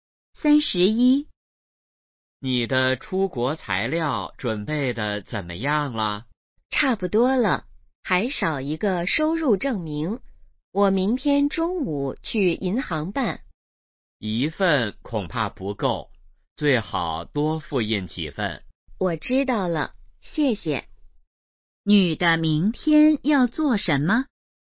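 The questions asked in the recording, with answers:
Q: 女的明天要做什么?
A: 去银行办收入证明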